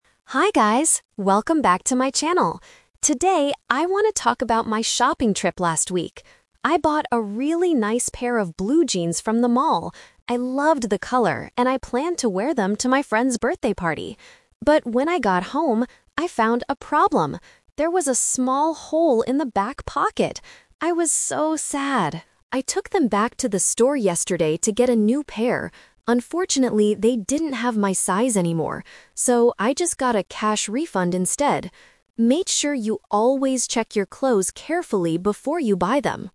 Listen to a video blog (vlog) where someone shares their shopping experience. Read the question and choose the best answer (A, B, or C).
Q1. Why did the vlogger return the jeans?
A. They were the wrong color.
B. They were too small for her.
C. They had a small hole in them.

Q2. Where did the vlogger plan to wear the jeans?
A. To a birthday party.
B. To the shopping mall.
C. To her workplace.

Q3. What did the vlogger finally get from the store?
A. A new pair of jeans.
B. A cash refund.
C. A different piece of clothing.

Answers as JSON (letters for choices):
{"1": "C", "2": "A", "3": "B"}

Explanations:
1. The vlogger clearly says, "There was a small hole in the back pocket!"
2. She says, "I planned to wear them to my friend's birthday party."
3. This is the "Twist". The vlogger says, "So, I just got a cash refund instead."

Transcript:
Vlogger: Hi guys! Welcome back to my channel. Today, I want to talk about my shopping trip last week. I bought a really nice pair of blue jeans from the mall. I loved the color and I planned to wear them to my friend's birthday party. But when I got home, I found a problem. There was a small hole in the back pocket! I was so sad. I took them back to the store yesterday to get a new pair. Unfortunately, they didn't have my size anymore. So, I just got a cash refund instead. Make sure you always check your clothes carefully before you buy them!